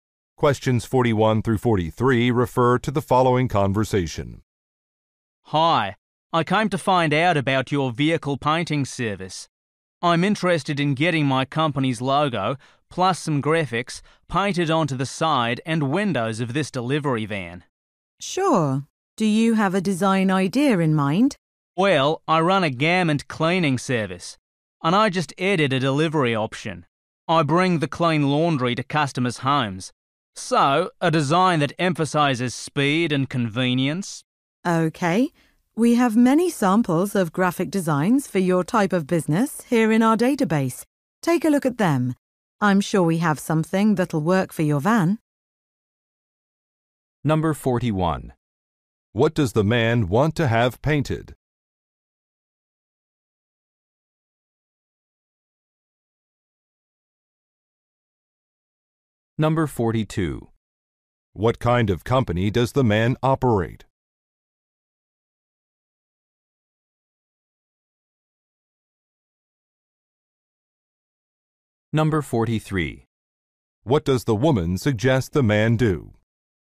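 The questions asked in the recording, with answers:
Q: What does the man want to have painted?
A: His company's logo and graphics on a delivery van

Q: What kind of company does the man operate?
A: A garment cleaning service

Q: What does the woman suggest the man do?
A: Look at design samples in the database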